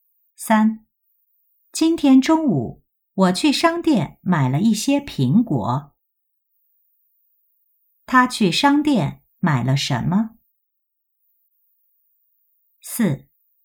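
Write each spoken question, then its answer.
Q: 他去商店买了什么?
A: 苹果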